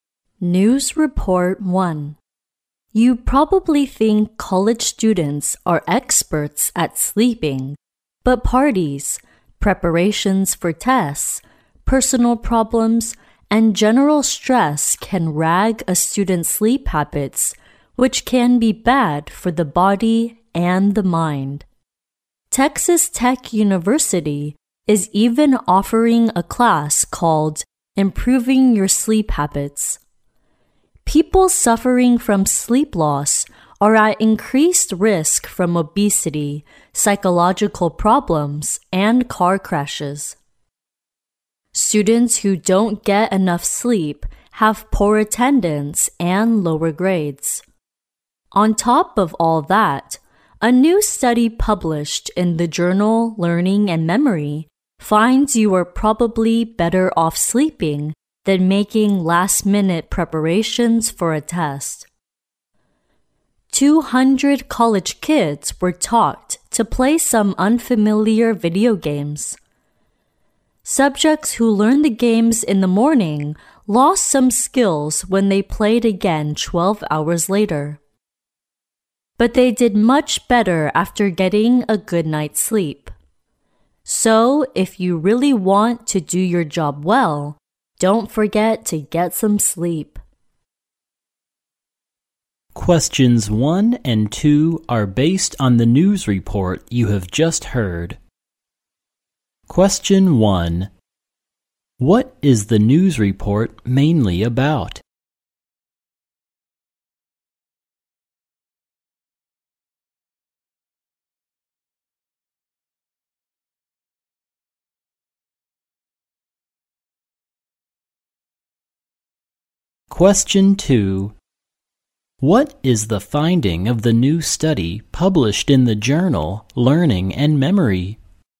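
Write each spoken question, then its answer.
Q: What is the news report mainly about?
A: The importance of sleep for college students

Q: What is the finding of the new study published in the journal Learning and Memory?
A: Sleeping is better than last-minute preparation for a test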